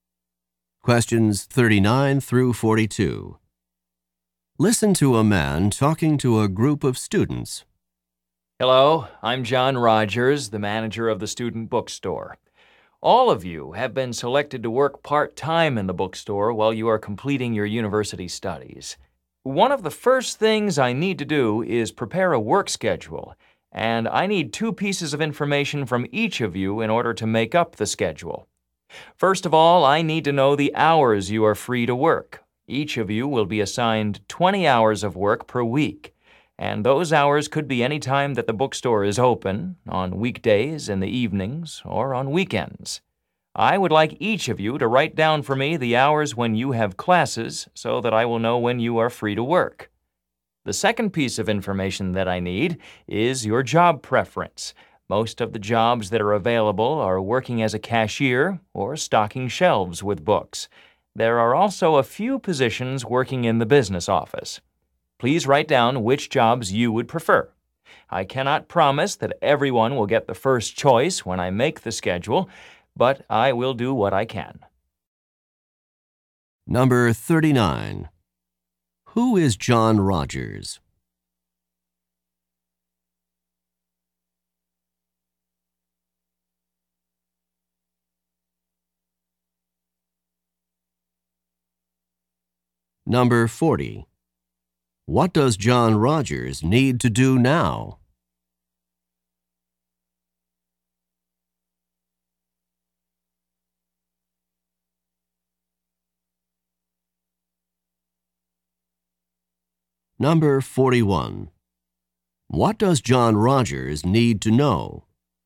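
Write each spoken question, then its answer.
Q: Who is John Rogers?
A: The manager of the student bookstore

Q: What does John Rogers need to do now?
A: Prepare a work schedule

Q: What does John Rogers need to know?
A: The hours students are free to work and their job preferences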